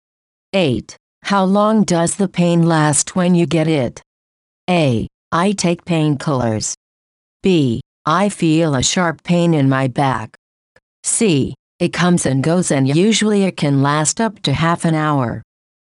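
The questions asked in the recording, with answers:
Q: How long does the pain last when you get it?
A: C: It comes and goes, and usually it can last up to half an hour.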